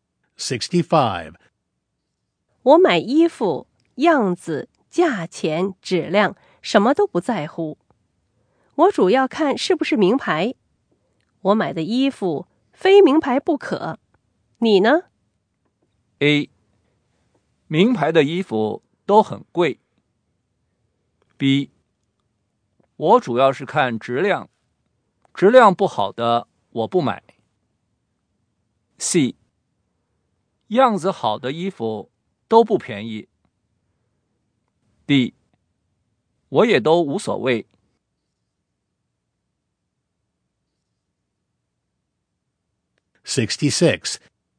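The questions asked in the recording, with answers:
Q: 我买的衣服,非名牌不可。你呢?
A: B: 我主要是看质量,质量不好的我不买。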